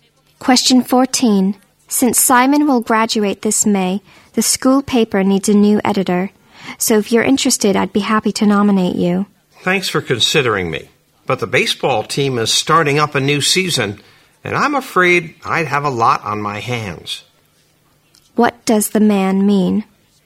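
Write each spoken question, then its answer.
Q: What does the man mean?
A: He is too busy with the baseball team to be the paper's editor.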